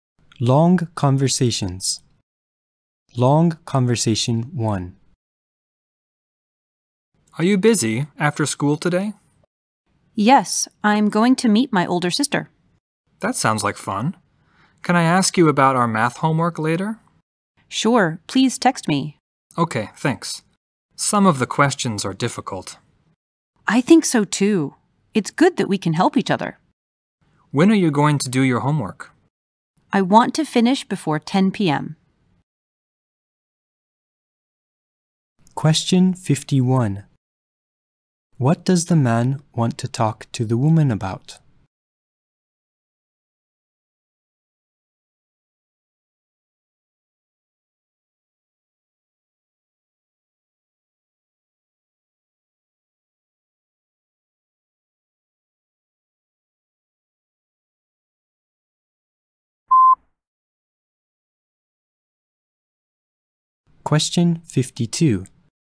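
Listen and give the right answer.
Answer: Their math homework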